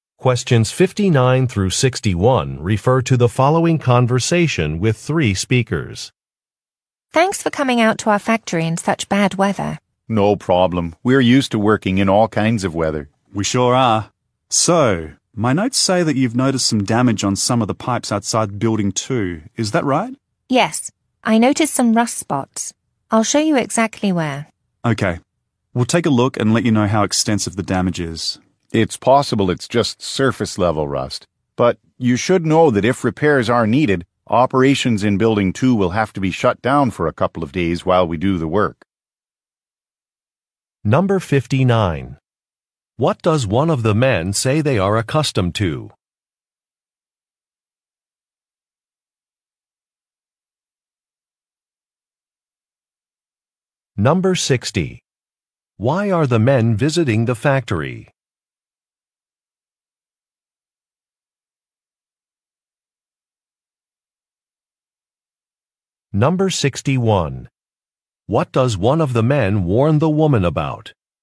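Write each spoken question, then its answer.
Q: What does one of the men say they are accustomed to?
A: Working in all kinds of weather

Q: Why are the men visiting the factory?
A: To inspect damaged pipes outside Building 2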